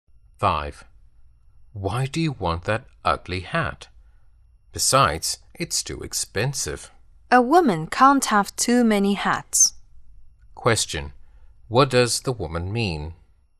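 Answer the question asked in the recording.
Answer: She still wants the hat; a woman can't have too many hats.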